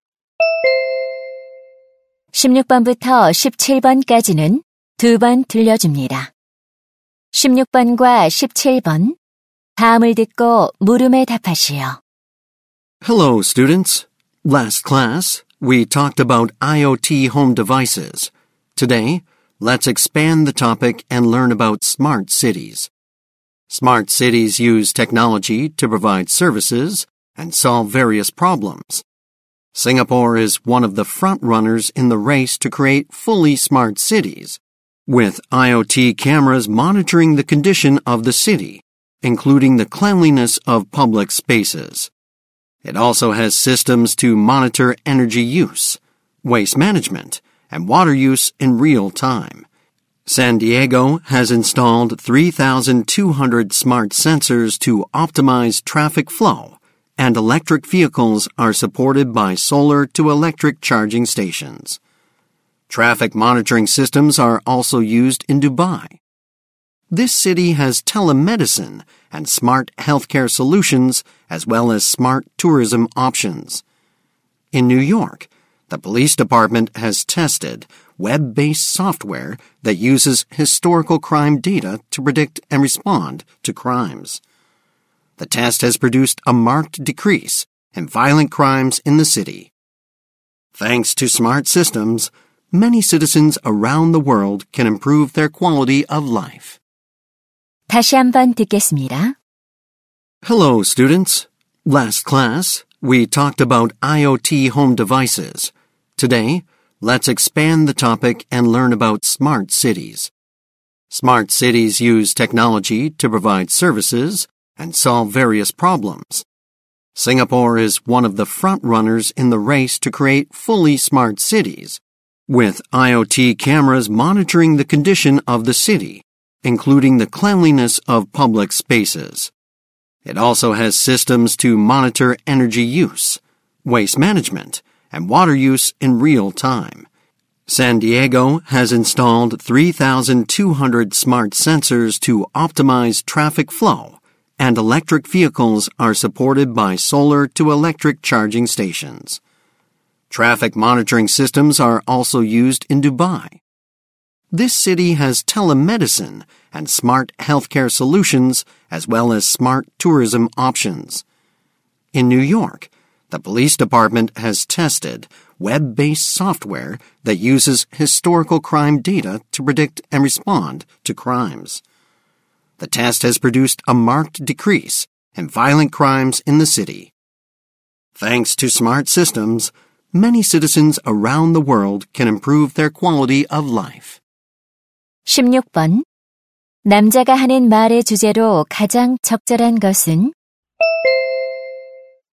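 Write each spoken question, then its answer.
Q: 남자가 하는 말의 주제로 가장 적절한 것은?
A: 세계 여러 도시의 스마트 시티 기술 사례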